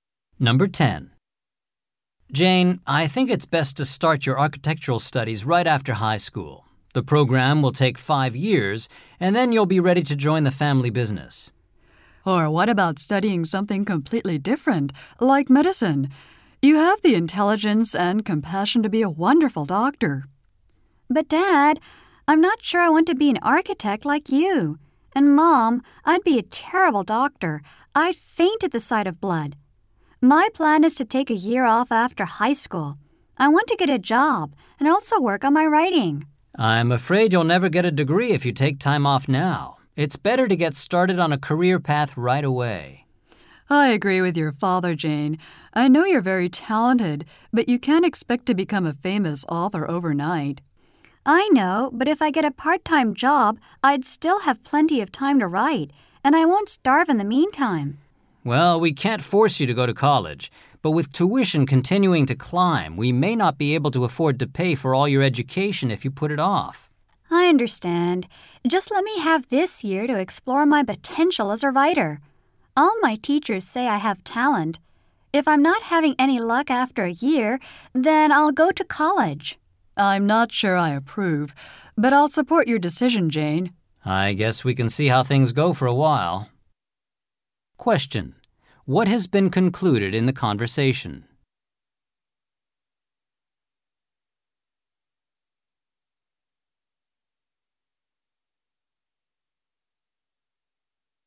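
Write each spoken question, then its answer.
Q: What has been concluded in the conversation?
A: Jane will take a year off to work and write, then go to college if it doesn't work out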